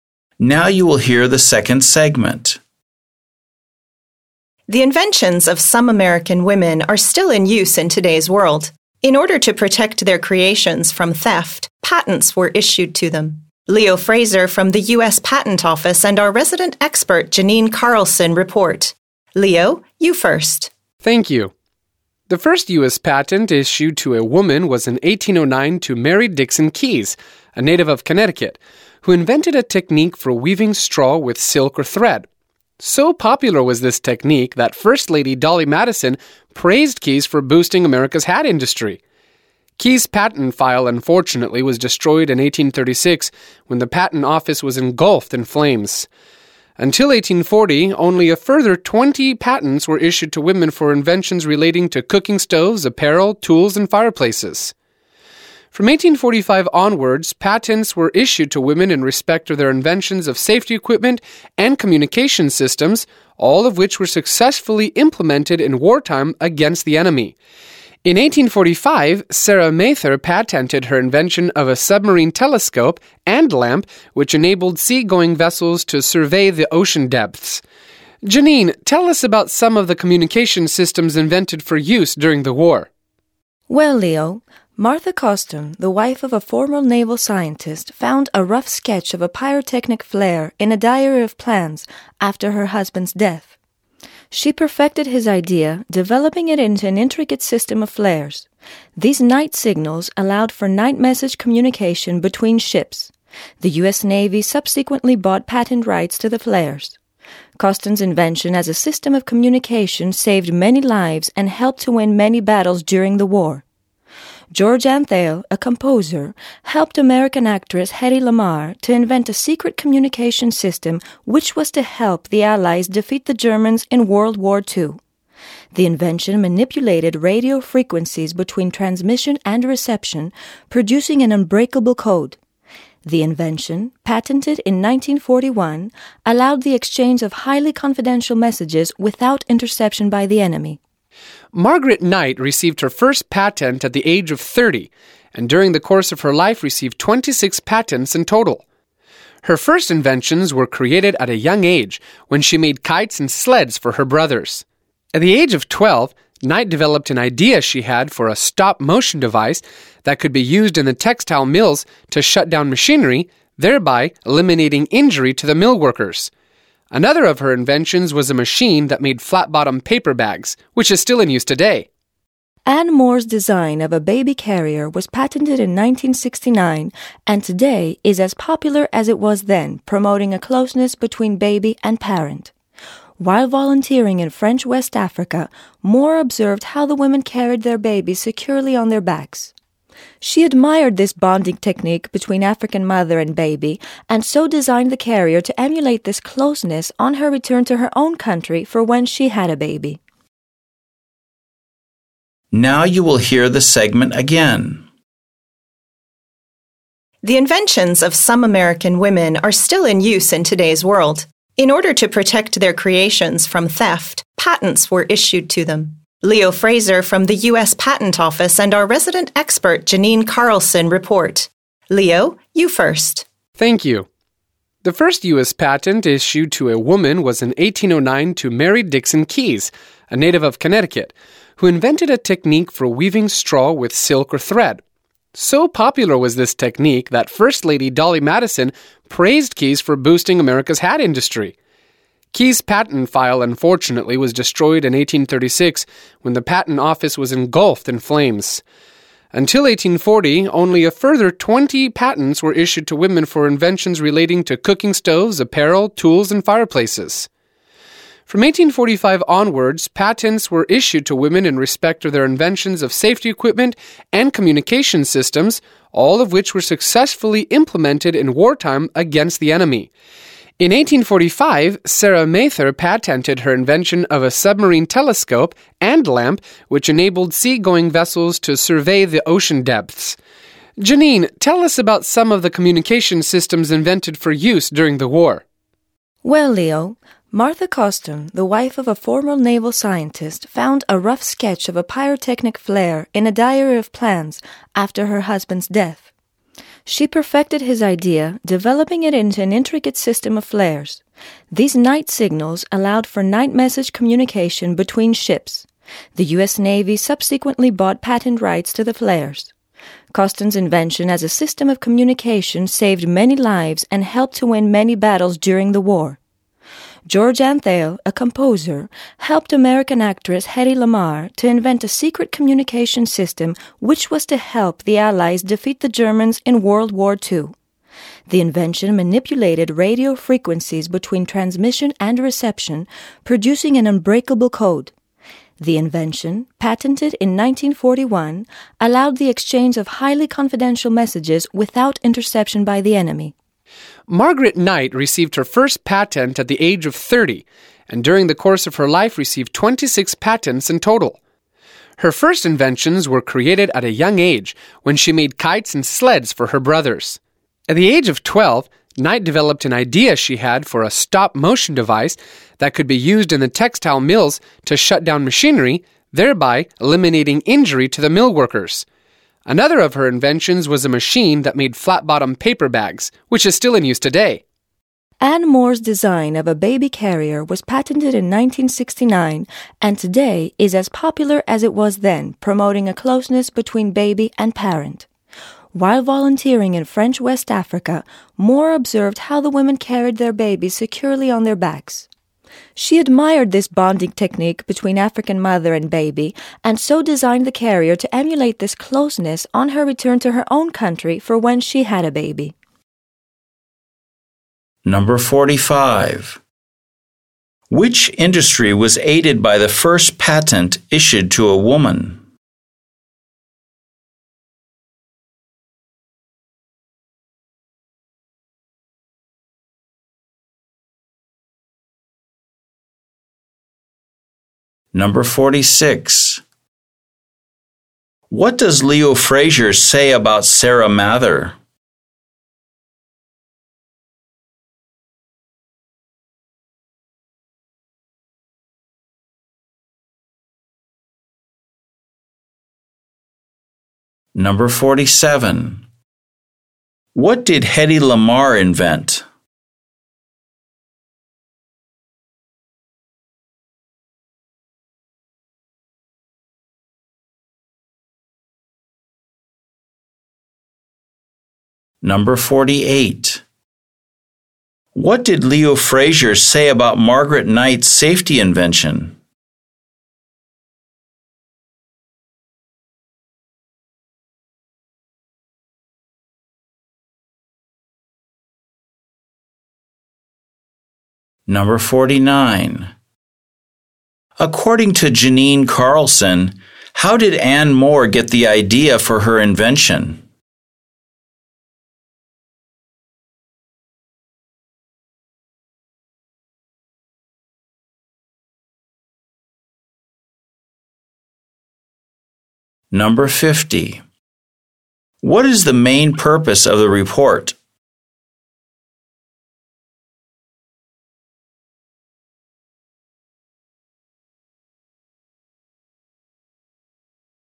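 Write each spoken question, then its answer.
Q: Which industry was aided by the first patent issued to a woman?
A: The hat industry

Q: What does Leo Frazier say about Sarah Mather?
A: She patented a submarine telescope and lamp in 1845

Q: What did Hedy Lamarr invent?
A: A secret communication system that produced an unbreakable code

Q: According to Janine Carlson, how did Anne Moore get the idea for her invention?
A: By watching women in French West Africa carry their babies on their backs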